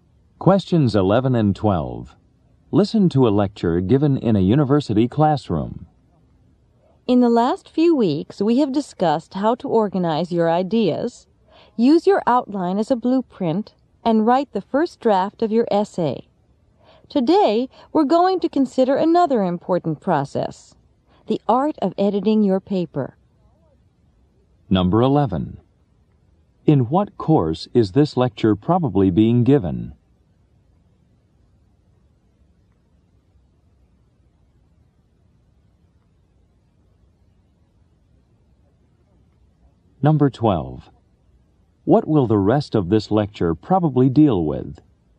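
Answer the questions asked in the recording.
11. A writing (composition) course
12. Editing a paper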